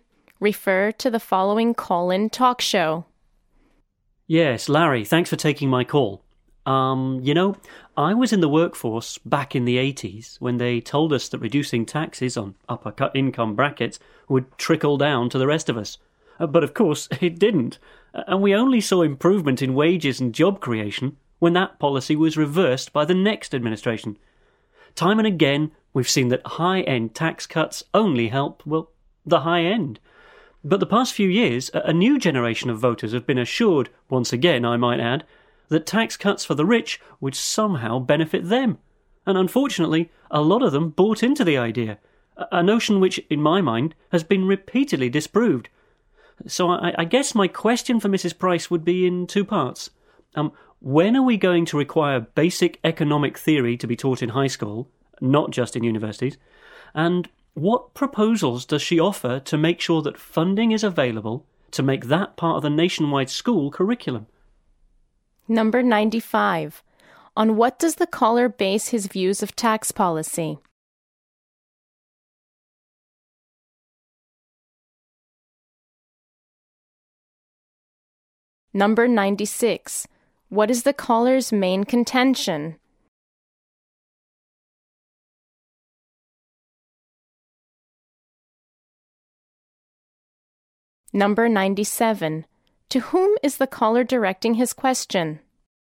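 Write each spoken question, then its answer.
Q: On what does the caller base his views of tax policy?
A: His own experience in the workforce since the 80s

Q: To whom is the caller directing his question?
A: Mrs. Price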